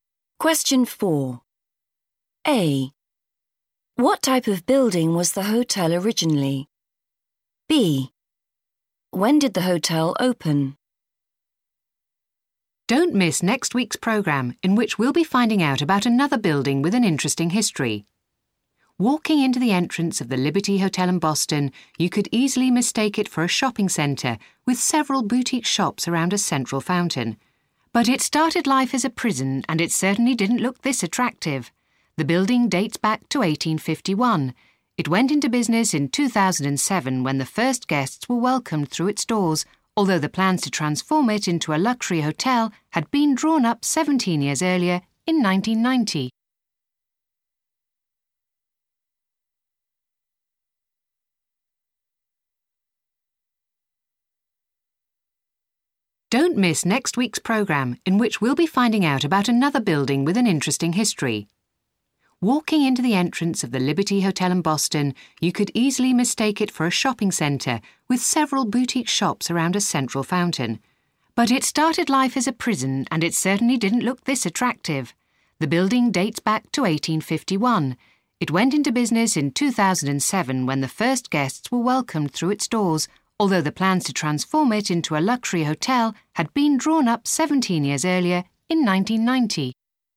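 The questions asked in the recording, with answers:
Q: What type of building was the hotel originally?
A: a prison

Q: When did the hotel open?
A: 2007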